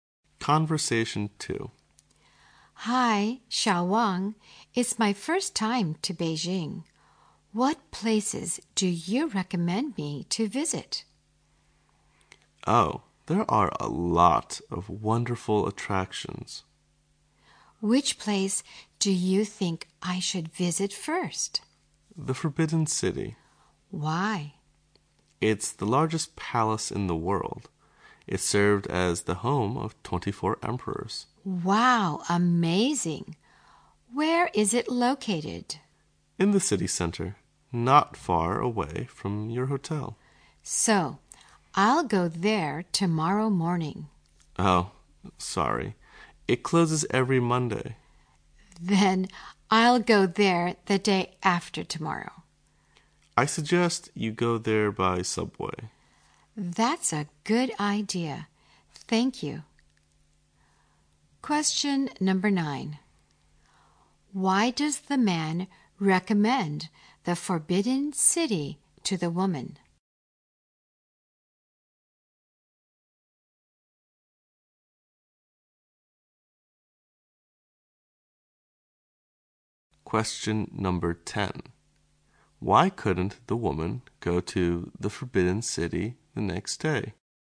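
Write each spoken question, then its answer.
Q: Why does the man recommend the Forbidden City to the woman?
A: It's the largest palace in the world.

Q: why couldn't the woman go to the Forbidden City the next day?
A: It closes every Monday.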